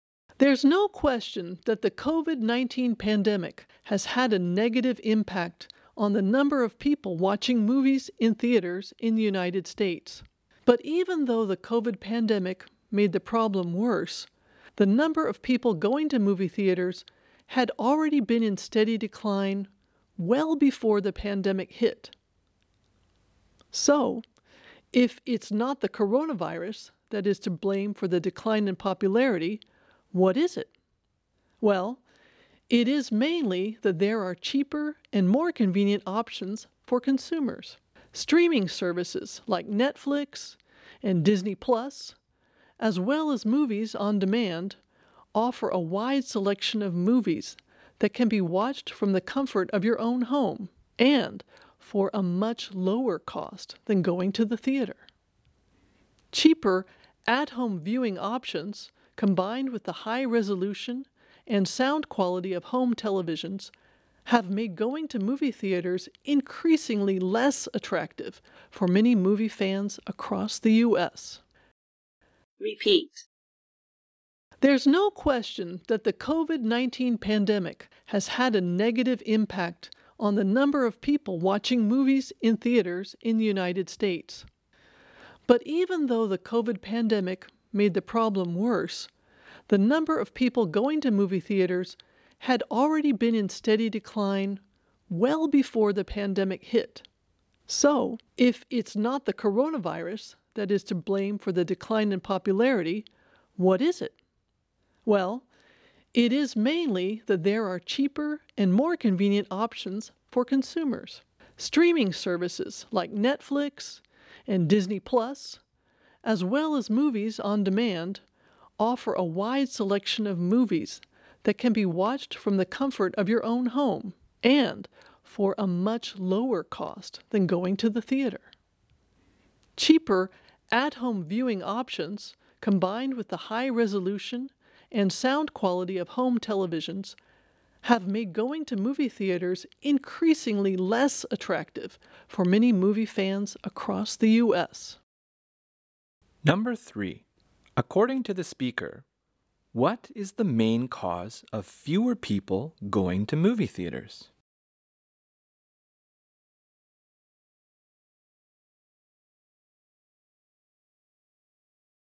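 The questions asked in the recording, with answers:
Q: According to the speaker, what is the main cause of fewer people going to movie theaters?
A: Cheaper, more convenient home viewing options like streaming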